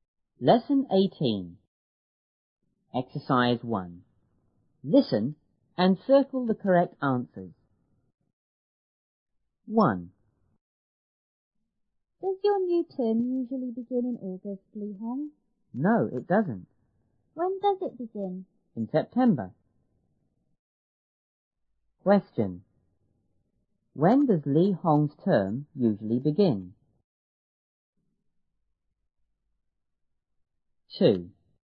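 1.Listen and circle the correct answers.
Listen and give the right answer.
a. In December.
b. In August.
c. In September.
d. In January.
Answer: c. In September.

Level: 初中英语广州版1B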